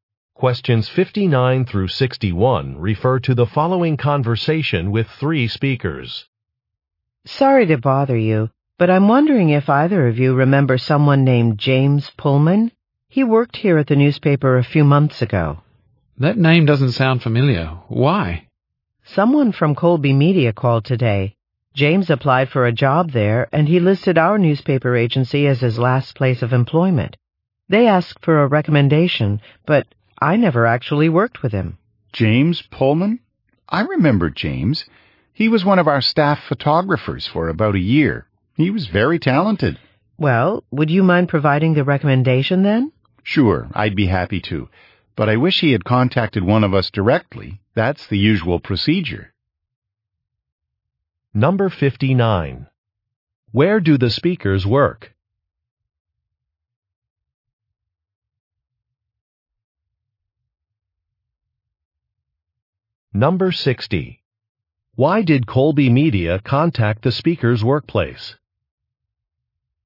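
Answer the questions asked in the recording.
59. At a newspaper
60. To ask for a recommendation for James Pullman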